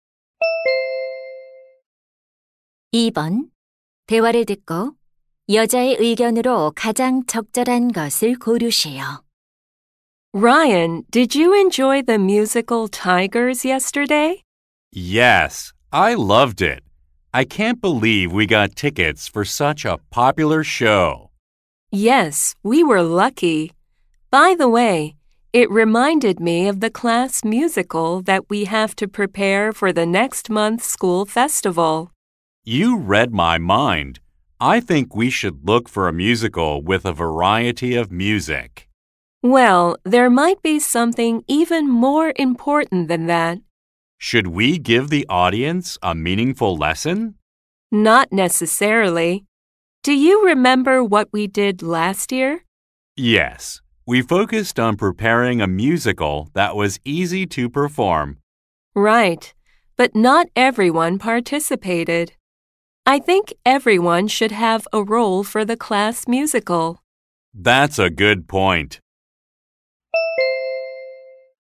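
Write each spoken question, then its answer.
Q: 대화를 듣고 여자의 의견으로 가장 적절한 것을 고르세요.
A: 학급 뮤지컬에서는 모든 학생이 역할을 맡아야 한다.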